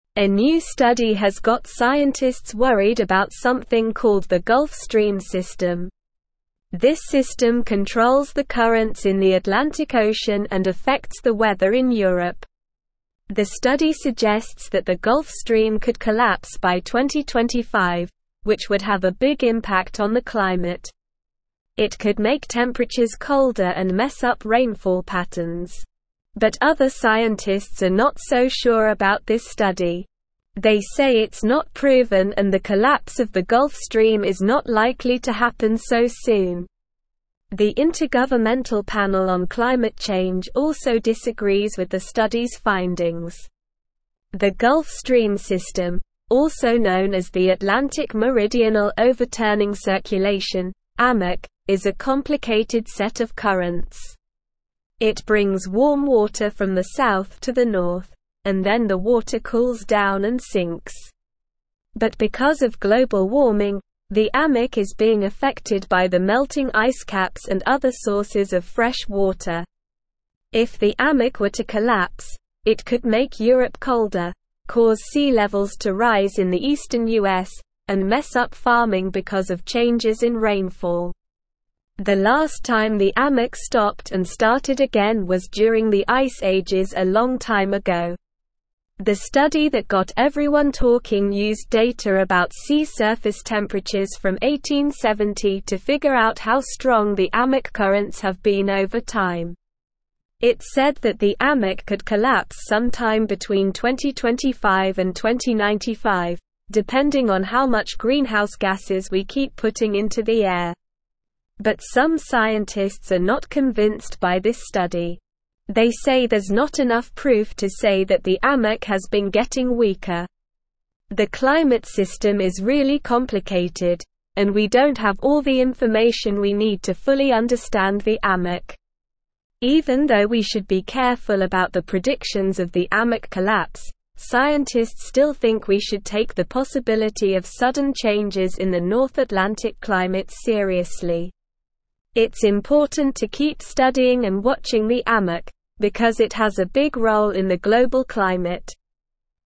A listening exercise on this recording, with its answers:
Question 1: A new study has got (1)______ worried about something called the Gulf Stream (2)______.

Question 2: A new study has got (1)______ worried about something called the Gulf Stream (2)______.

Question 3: This system controls the currents in the (3)______ Ocean and affects the weather in Europe.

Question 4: They say it's not (4)______ and the collapse of the Gulf Stream is not likely to happen so soon.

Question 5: The Intergovernmental Panel on Climate Change also disagrees with the study's (5)______.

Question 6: It (6)______ warm (7)______ from the south to the north, and then the water cools down and sinks.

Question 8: But because of global warming, the Amoc is being affected by the melting ice caps and (8)______ sources of fresh water.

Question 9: The last time the Amoc (9)______ and started again was during the Ice Ages a long time ago.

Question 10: The study that got everyone talking used data about sea surface (10)______ from 1870 to (11)______ out how strong the Amoc (12)______ have been over time.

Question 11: The study that got everyone talking used data about sea surface (10)______ from 1870 to (11)______ out how strong the Amoc (12)______ have been over time.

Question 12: The study that got everyone talking used data about sea surface (10)______ from 1870 to (11)______ out how strong the Amoc (12)______ have been over time.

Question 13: The climate system is really complicated, and we don't have all the (13)______ we need to fully understand the Amoc.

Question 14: Even though we should be careful about the (14)______ of the Amoc collapse, scientists still (15)______ we should take the possibility of sudden changes in the North Atlantic climate seriously.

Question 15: Even though we should be careful about the (14)______ of the Amoc collapse, scientists still (15)______ we should take the possibility of sudden changes in the North Atlantic climate seriously.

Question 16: It's (16)______ to keep studying and watching the Amoc, because it has a big role in the global climate.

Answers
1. scientists
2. system
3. Atlantic
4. proven
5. findings
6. brings
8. other
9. stopped
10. temperatures
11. figure
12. currents
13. information
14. predictions
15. think
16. important

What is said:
A new study has got scientists worried about something called the Gulf Stream system. This system controls the currents in the Atlantic Ocean and affects the weather in Europe. The study suggests that the Gulf Stream could collapse by 2025, which would have a big impact on the climate. It could make temperatures colder and mess up rainfall patterns. But other scientists are not so sure about this study. They say it's not proven and the collapse of the Gulf Stream is not likely to happen so soon. The Intergovernmental Panel on Climate Change also disagrees with the study's findings.
The Gulf Stream system, also known as the Atlantic Meridional Overturning Circulation (Amoc), is a complicated set of currents. It brings warm water from the south to the north, and then the water cools down and sinks. But because of global warming, the Amoc is being affected by the melting ice caps and other sources of fresh water. If the Amoc were to collapse, it could make Europe colder, cause sea levels to rise in the eastern US, and mess up farming because of changes in rainfall. The last time the Amoc stopped and started again was during the Ice Ages a long time ago.
The study that got everyone talking used data about sea surface temperatures from 1870 to figure out how strong the Amoc currents have been over time. It said that the Amoc could collapse sometime between 2025 and 2095, depending on how much greenhouse gases we keep putting into the air. But some scientists are not convinced by this study. They say there's not enough proof to say that the Amoc has been getting weaker. The climate system is really complicated, and we don't have all the information we need to fully understand the Amoc.
Even though we should be careful about the predictions of the Amoc collapse, scientists still think we should take the possibility of sudden changes in the North Atlantic climate seriously. It's important to keep studying and watching the Amoc, because it has a big role in the global climate.

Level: Level 3